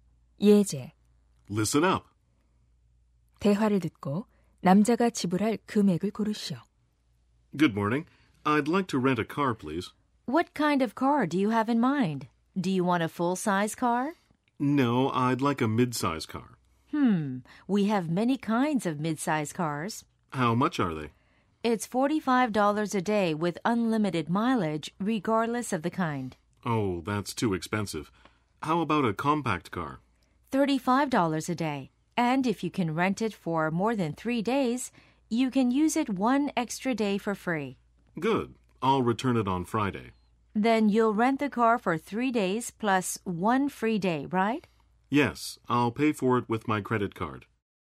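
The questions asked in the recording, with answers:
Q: 대화를 듣고 남자가 지불할 금액을 고르시오.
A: $105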